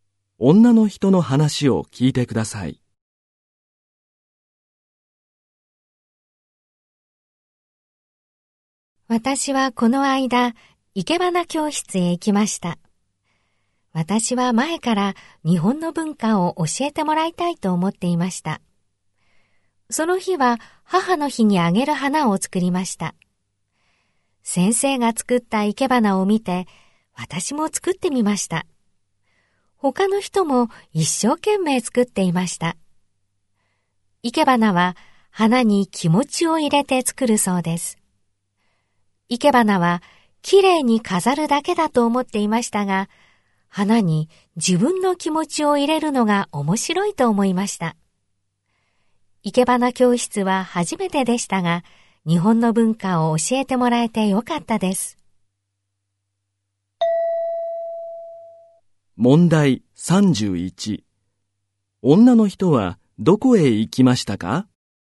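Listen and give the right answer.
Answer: 生け花教室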